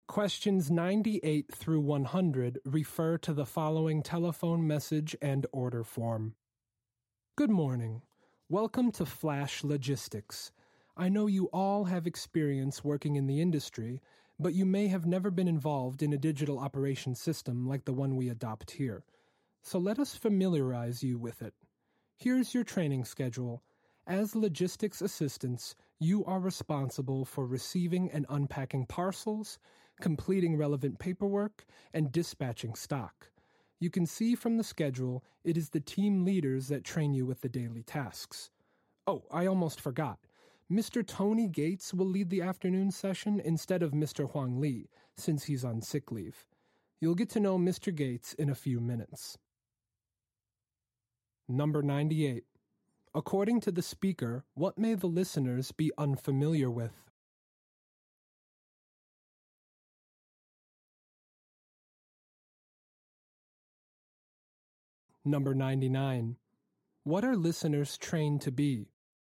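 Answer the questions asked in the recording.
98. A digital operation system
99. Logistics assistants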